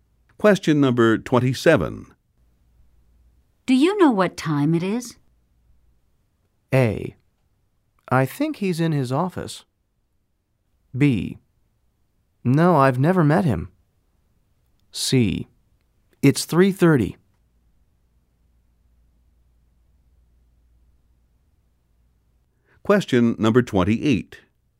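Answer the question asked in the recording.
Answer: C: It's 3:30.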